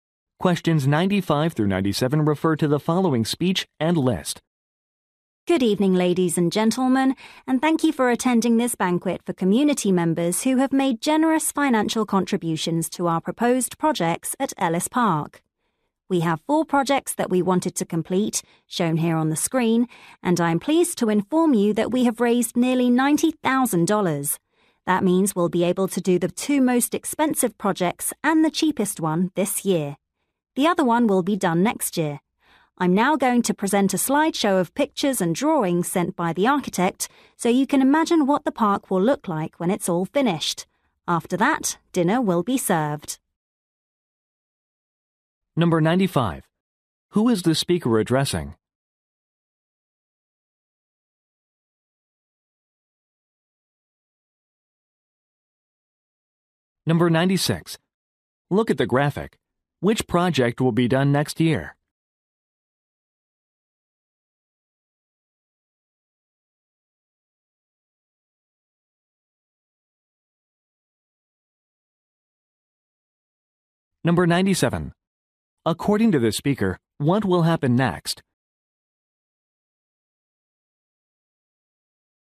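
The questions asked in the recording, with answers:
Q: Who is the speaker addressing?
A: Community members who donated money

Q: According to the speaker, what will happen next?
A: A slideshow of the park designs will be shown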